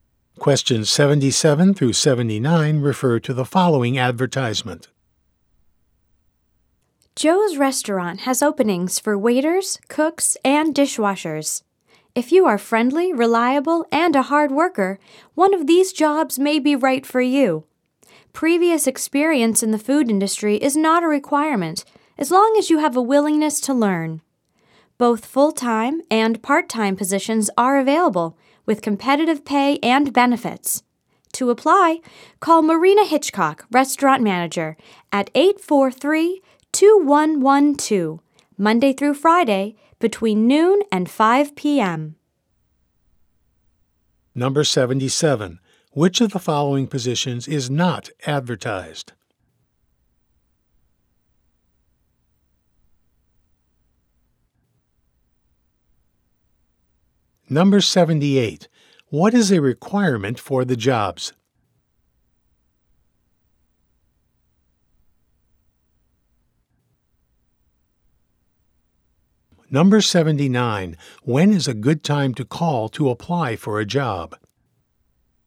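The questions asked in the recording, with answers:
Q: What is a requirement for the jobs?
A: A willingness to learn

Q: When is a good time to call to apply for a job?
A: Monday through Friday, between noon and 5 p.m.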